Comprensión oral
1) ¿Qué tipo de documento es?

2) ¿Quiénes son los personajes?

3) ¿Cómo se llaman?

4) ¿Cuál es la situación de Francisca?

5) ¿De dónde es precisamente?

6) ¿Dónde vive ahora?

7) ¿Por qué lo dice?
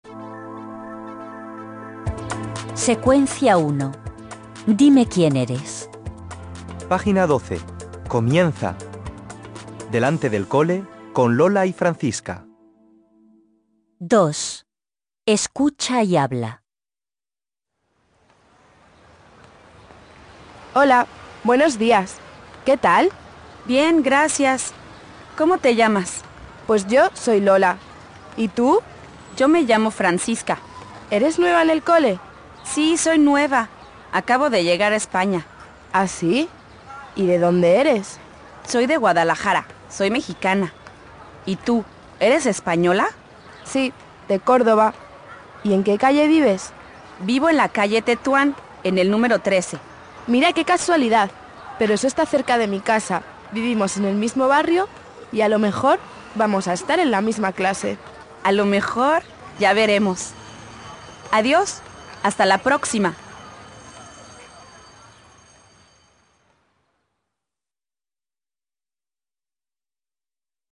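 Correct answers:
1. Es un diálogo.
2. Dos chicas, alumnas del colegio.
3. Lola y Francisca.
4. Es nueva en el cole, acaba de llegar a España.
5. De Guadalajara, México.
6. En la calle Tetuán, número 13.
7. Porque viven cerca, en el mismo barrio.

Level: 4ème BIL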